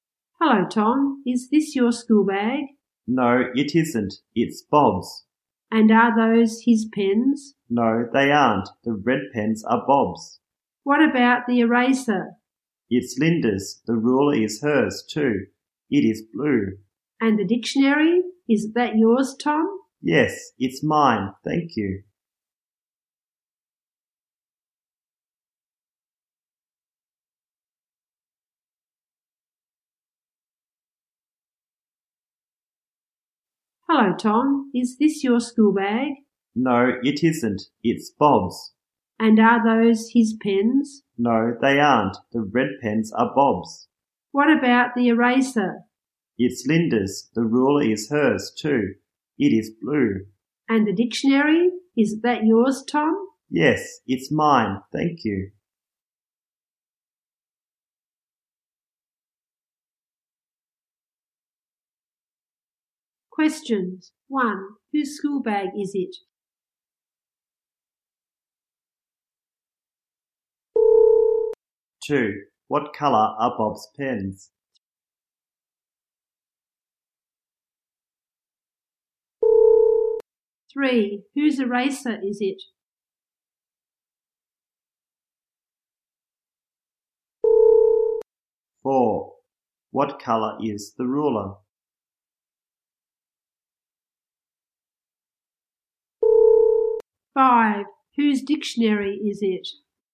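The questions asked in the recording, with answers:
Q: Whose school bag is it?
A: Bob's

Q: What colour are Bob's pens?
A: Red

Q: Whose eraser is it?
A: Linda's

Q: What colour is the ruler?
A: Blue

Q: Whose dictionary is it?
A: Tom's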